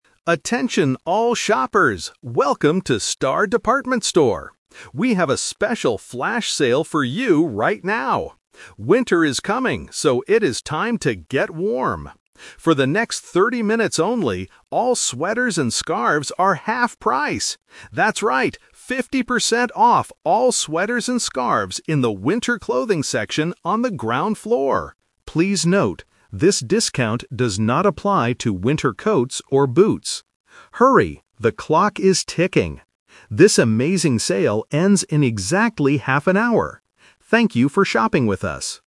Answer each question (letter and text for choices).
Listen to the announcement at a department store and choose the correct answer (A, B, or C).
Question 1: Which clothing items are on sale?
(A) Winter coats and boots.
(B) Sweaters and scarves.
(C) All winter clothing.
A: (B) Sweaters and scarves.

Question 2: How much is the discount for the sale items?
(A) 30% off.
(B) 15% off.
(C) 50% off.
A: (C) 50% off.

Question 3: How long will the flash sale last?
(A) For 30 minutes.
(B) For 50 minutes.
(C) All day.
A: (A) For 30 minutes.

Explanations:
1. The announcer clearly states, "all sweaters and scarves are half price!" Option (A) is the trap; the announcer specifically says the discount does not apply to coats or boots. Option (C) is also a trap because not all winter clothes are on sale.
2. This question tests vocabulary paraphrasing. The announcer says the items are "half price" and repeats "fifty percent off." Option (A) is a number trap; "thirty" is mentioned, but it is for the time (30 minutes), not the discount percentage. Option (B) is not mentioned.
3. The announcer says, "For the next thirty minutes only..." and later reminds shoppers that the sale "ends in exactly half an hour." Option (B) is the trap (using the number 50 from the discount percentage). Option (C) is incorrect because it is a very short flash sale.

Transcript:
Announcer: Attention all shoppers! Welcome to Star Department Store. We have a special flash sale for you right now. Winter is coming, so it is time to get warm. For the next thirty minutes only, all sweaters and scarves are half price! That's right, fifty percent off all sweaters and scarves in the winter clothing section on the ground floor. Please note, this discount does not apply to winter coats or boots. Hurry, the clock is ticking! This amazing sale ends in exactly half an hour. Thank you for shopping with us!

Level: A2